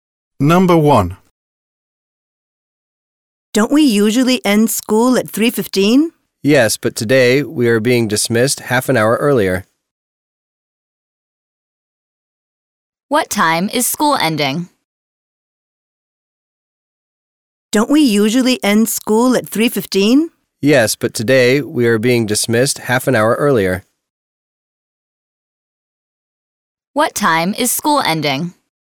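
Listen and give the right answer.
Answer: 2:45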